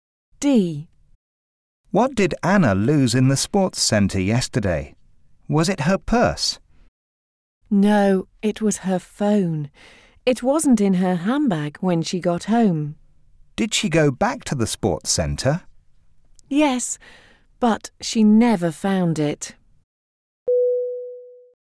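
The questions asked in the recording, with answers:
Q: What did Anna lose in the sports centre yesterday?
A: Her phone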